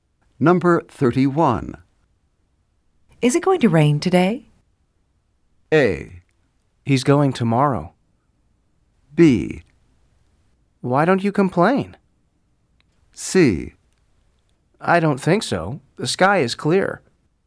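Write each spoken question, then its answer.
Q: Is it going to rain today?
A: C: I don't think so. The sky is clear.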